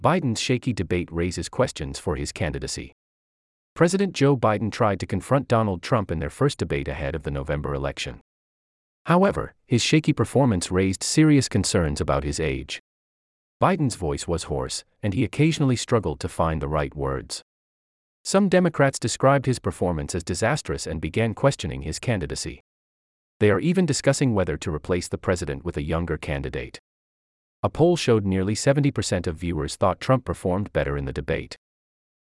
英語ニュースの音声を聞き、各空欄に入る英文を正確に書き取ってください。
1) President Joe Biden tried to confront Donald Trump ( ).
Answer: in their first debate ahead of the November election

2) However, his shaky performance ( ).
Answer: raised serious concerns about his age

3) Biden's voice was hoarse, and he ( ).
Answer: occasionally struggled to find the right words

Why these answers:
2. ⇒ 討論会は既に実施された過去のことなので、時制が過去形になります。「懸念を引き起こしている」というニュアンスにするときは「is raising」と現在進行形にするのが自然です。
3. ⇒ 討論会は過去のことなので、時制が過去形になります。英語ニュースで現在形を使うのは「習慣・事実」など限定されたケースです。

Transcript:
Biden's Shaky Debate Raises Questions for his Candidacy
President Joe Biden tried to confront Donald Trump in their first debate ahead of the November election.
However, his shaky performance raised serious concerns about his age.
Biden's voice was hoarse, and he occasionally struggled to find the right words.
Some Democrats described his performance as disastrous and began questioning his candidacy.
They are even discussing whether to replace the president with a younger candidate.
A poll showed nearly 70 percent of viewers thought Trump performed better in the debate.

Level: 中級